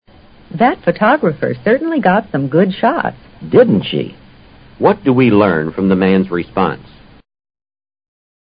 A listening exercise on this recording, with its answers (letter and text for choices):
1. What do we learn from the man's response?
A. He finished playing tennis with the photographer.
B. One of the subjects didn't know he was being photographed.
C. He shares the woman's opinion of the photos.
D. The photographer could have gotten more pictures.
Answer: C. He shares the woman's opinion of the photos.

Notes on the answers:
Didn't she? (= didn't she get some good shots) 是一种省略句,形式上是否定问句,其实是对别人的意见表示赞同,很像汉语中的"可不是吗?"shot: 拍摄的照片。response: 反应。